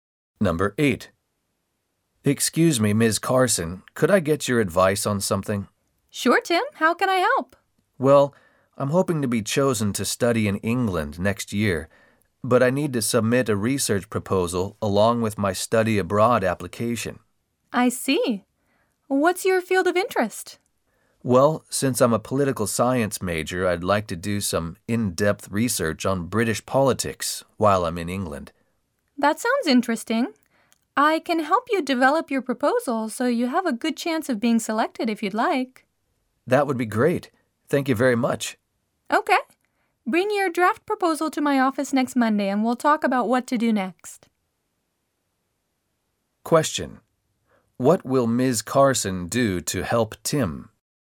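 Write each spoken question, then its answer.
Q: What will Ms. Carson do to help Tim?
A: Help him develop his research proposal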